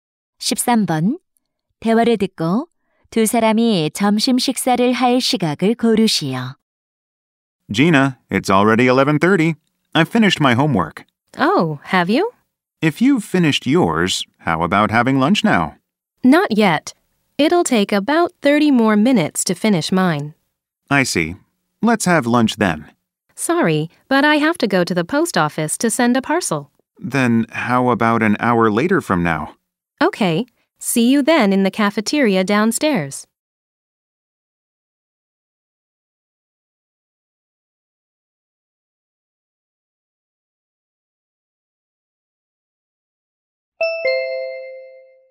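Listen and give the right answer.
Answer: 12시 30분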